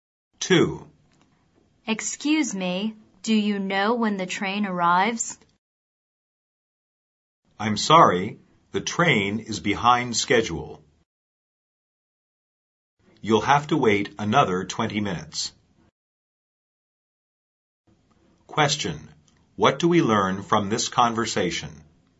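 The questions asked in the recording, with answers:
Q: What do we learn from this conversation?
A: The train is late; it will arrive in 20 minutes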